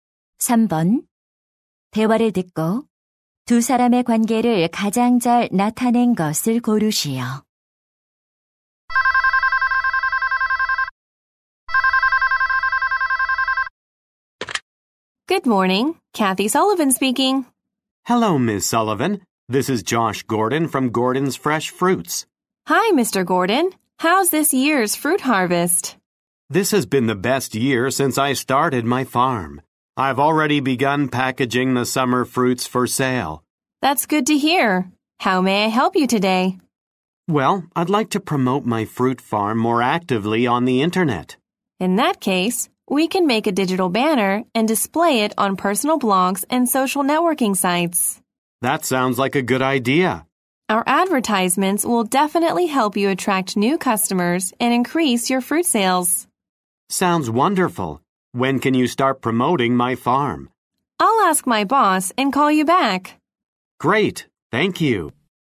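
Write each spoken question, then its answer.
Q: 대화를 듣고 두 사람의 관계를 가장 잘 나타낸 것을 고르시오.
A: 과수원 주인 - 광고 회사 직원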